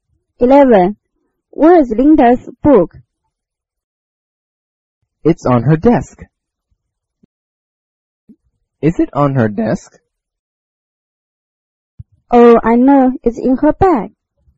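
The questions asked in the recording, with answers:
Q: Where is Linda's book?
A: In her bag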